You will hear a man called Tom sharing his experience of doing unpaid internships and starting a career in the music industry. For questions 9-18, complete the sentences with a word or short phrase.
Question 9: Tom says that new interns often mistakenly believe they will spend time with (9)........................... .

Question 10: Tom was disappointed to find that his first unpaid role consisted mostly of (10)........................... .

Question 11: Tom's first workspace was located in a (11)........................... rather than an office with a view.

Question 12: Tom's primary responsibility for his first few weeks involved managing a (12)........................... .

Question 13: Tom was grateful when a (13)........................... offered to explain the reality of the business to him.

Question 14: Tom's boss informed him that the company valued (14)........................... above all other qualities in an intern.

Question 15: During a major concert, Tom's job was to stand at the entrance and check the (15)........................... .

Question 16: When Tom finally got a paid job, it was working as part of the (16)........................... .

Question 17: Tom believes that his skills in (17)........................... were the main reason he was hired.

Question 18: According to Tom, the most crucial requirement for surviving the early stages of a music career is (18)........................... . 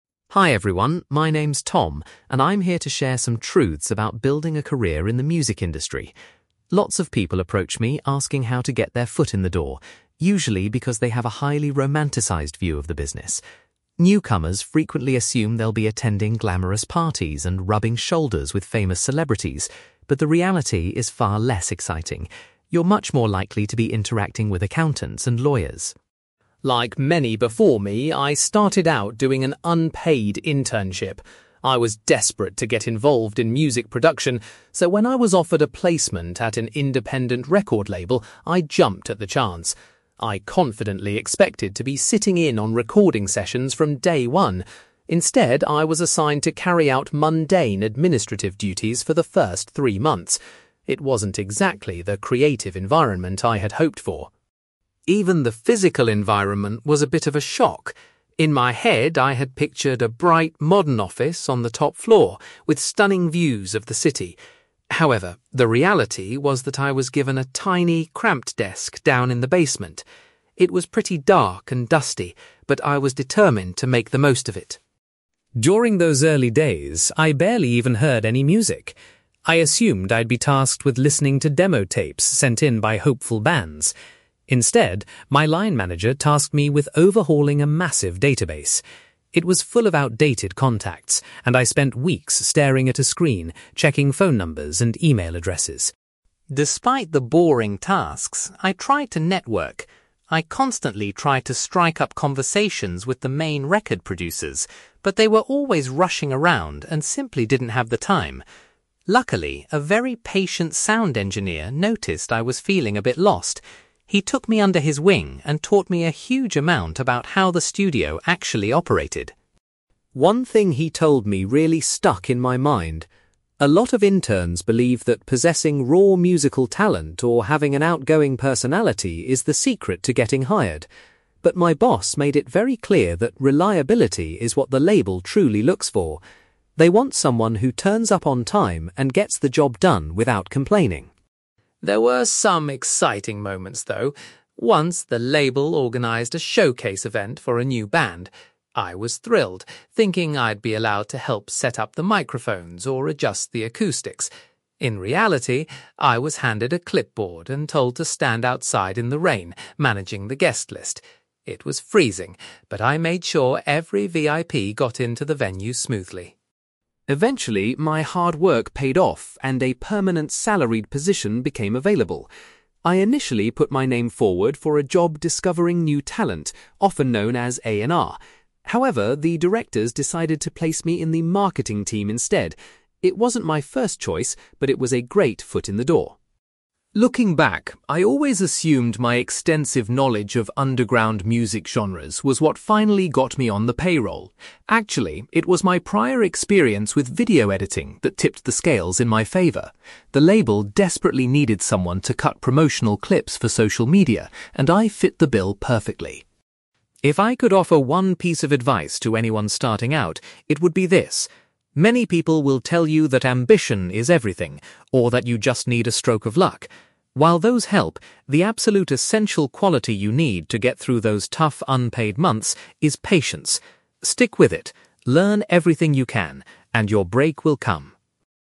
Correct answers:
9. celebrities
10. administrative duties
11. basement
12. database
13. sound engineer
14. reliability
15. guest list
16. marketing team
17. video editing
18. patience

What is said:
Tom: Hi everyone, my name's Tom, and I'm here to share some truths about building a career in the music industry. Lots of people approach me asking how to get their foot in the door, usually because they have a highly romanticised view of the business. Newcomers frequently assume they'll be attending glamorous parties and rubbing shoulders with famous celebrities, but the reality is far less exciting. You're much more likely to be interacting with accountants and lawyers.
Like many before me, I started out doing an unpaid internship. I was desperate to get involved in music production, so when I was offered a placement at an independent record label, I jumped at the chance. I confidently expected to be sitting in on recording sessions from day one. Instead, I was assigned to carry out mundane administrative duties for the first three months. It wasn't exactly the creative environment I had hoped for.
Even the physical environment was a bit of a shock. In my head, I had pictured a bright, modern office on the top floor with stunning views of the city. However, the reality was that I was given a tiny, cramped desk down in the basement. It was pretty dark and dusty, but I was determined to make the most of it.
During those early days, I barely even heard any music. I assumed I'd be tasked with listening to demo tapes sent in by hopeful bands. Instead, my line manager tasked me with overhauling a massive database. It was full of outdated contacts, and I spent weeks staring at a screen, checking phone numbers and email addresses.
Despite the boring tasks, I tried to network. I constantly tried to strike up conversations with the main record producers, but they were always rushing around and simply didn't have the time. Luckily, a very patient sound engineer noticed I was feeling a bit lost. He took me under his wing and taught me a huge amount about how the studio actually operated.
One thing he told me really stuck in my mind. A lot of interns believe that possessing raw musical talent or having an outgoing personality is the secret to getting hired. But my boss made it very clear that reliability is what the label truly looks for. They want someone who turns up on time and gets the job done without complaining.
There were some exciting moments, though. Once, the label organised a showcase event for a new band. I was thrilled, thinking I'd be allowed to help set up the microphones or adjust the acoustics. In reality, I was handed a clipboard and told to stand outside in the rain, managing the guest list. It was freezing, but I made sure every VIP got into the venue smoothly.
Eventually, my hard work paid off and a permanent, salaried position became available. I initially put my name forward for a job discovering new talent, often known as A&R. However, the directors decided to place me in the marketing team instead. It wasn't my first choice, but it was a great foot in the door.
Looking back, I always assumed my extensive knowledge of underground music genres was what finally got me on the payroll. Actually, it was my prior experience with video editing that tipped the scales in my favour. The label desperately needed someone to cut promotional clips for social media, and I fit the bill perfectly.
If I could offer one piece of advice to anyone starting out, it would be this. Many people will tell you that ambition is everything, or that you just need a stroke of luck. While those help, the absolute essential quality you need to get through those tough, unpaid months is patience. Stick with it, learn everything you can, and your break will come.

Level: B2